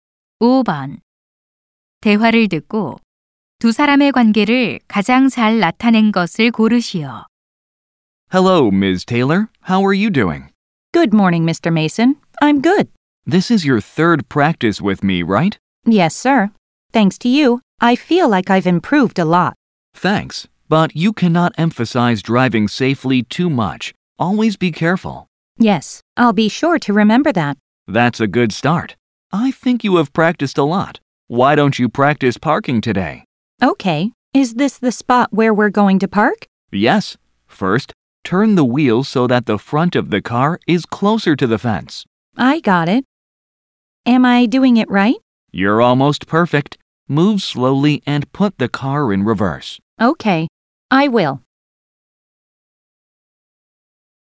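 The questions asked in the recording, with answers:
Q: 대화를 듣고 두 사람의 관계를 가장 잘 나타낸 것을 고르시오.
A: 운전 강사 - 수강생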